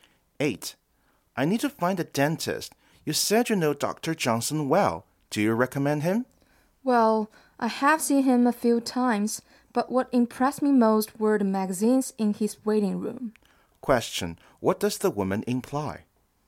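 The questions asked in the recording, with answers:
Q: What does the woman imply?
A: She can't really say whether Dr. Johnson is a good dentist.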